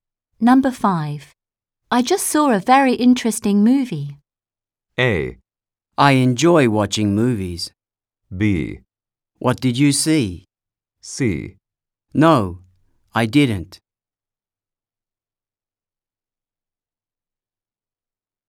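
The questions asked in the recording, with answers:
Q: I just saw a very interesting movie.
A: B: What did you see?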